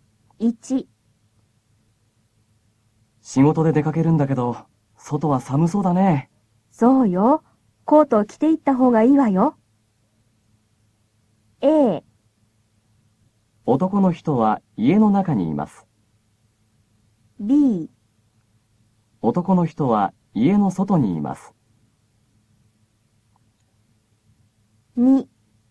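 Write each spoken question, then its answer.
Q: A。男の人は家の中にいます。B。男の人は家の外にいます。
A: A: 男の人は家の中にいます。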